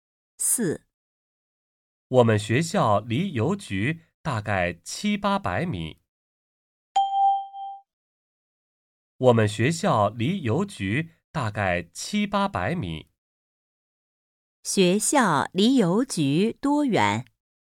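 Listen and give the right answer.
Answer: 大概700-800米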